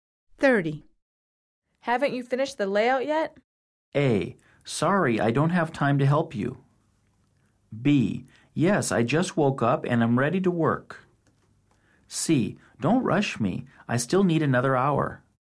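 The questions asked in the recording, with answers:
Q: Haven't you finished the layout yet?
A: C: Don't rush me. I still need another hour.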